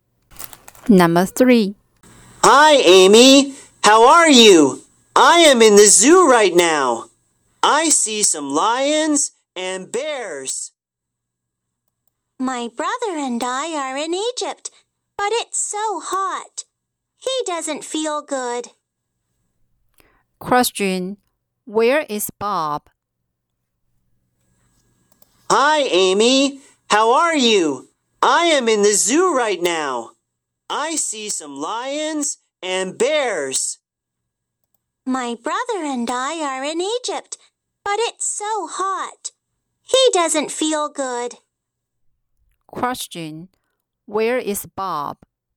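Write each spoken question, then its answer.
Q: Where is Bob?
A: In the zoo, in Egypt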